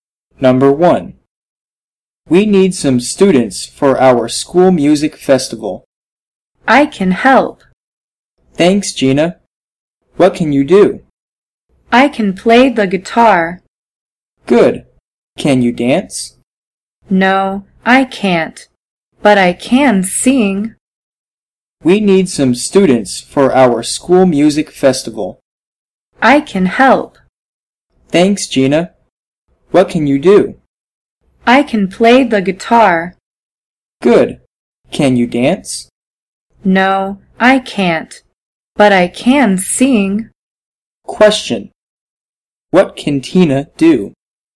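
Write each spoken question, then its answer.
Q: What can Tina do?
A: She can play the guitar and sing.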